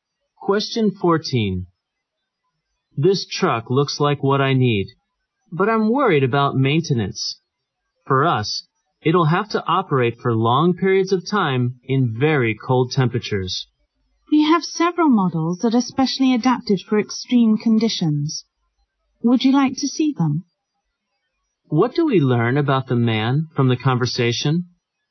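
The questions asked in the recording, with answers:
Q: What do we learn about the man from the conversation?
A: He needs a truck that can run long periods in very cold temperatures.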